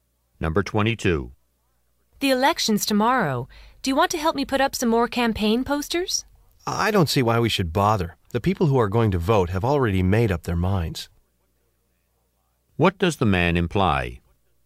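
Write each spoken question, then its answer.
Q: What does the man imply?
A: Putting up more posters won't change anyone's vote.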